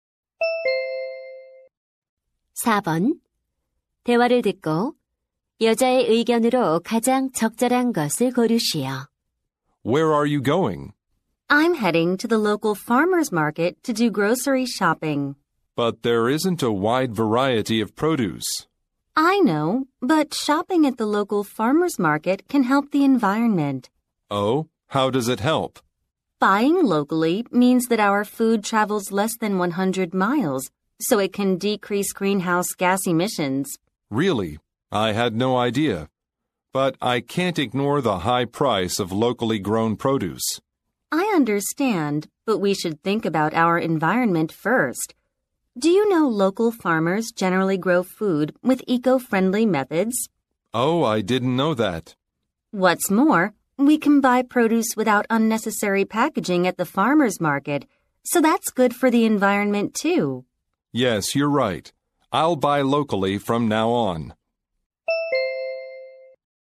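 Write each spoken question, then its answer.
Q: 대화를 듣고 여자의 의견으로 가장 적절한 것을 고르시오.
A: 지역 농산물 시장에서 장을 보는 것이 환경에 도움이 된다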